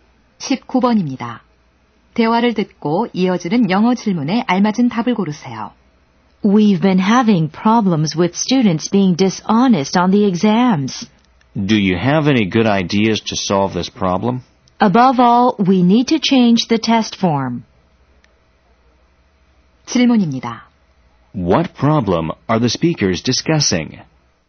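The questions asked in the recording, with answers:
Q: What problem are the speakers discussing?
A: Students cheating on exams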